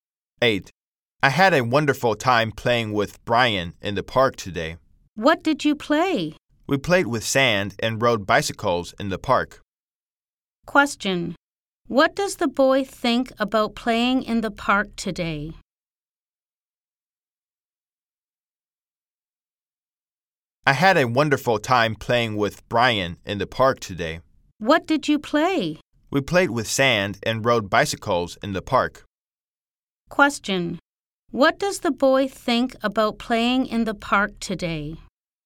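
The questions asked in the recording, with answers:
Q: Question. What does the boy think about playing in the park today?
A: It was wonderful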